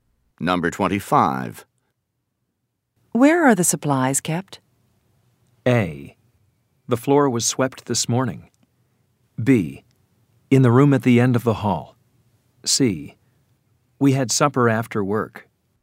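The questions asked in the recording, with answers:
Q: Where are the supplies kept?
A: B: In the room at the end of the hall.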